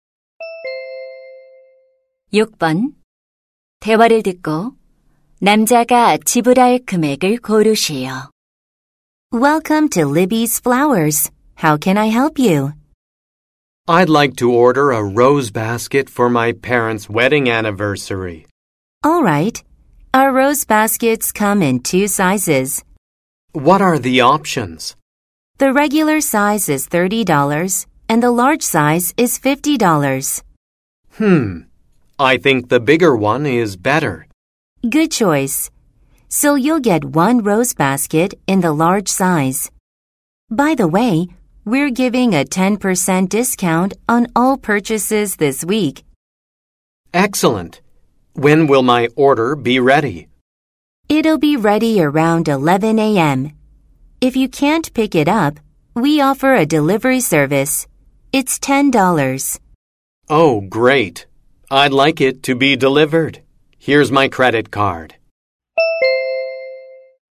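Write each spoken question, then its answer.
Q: 대화를 듣고 남자가 지불할 금액을 고르시오.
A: $55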